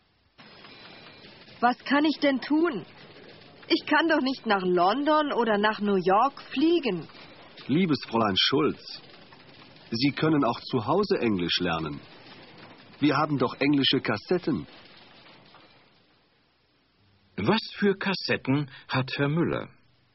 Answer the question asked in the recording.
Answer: Er hat englische Kassetten.